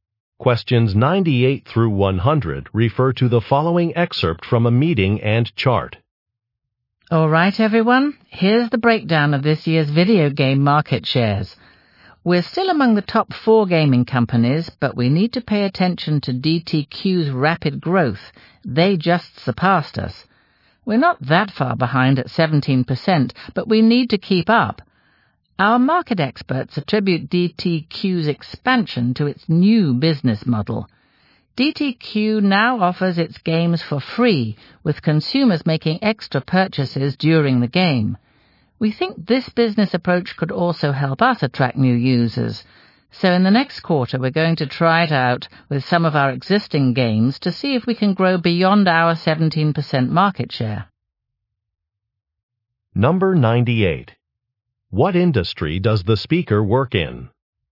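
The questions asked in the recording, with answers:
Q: What industry does the speaker work in?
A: Video games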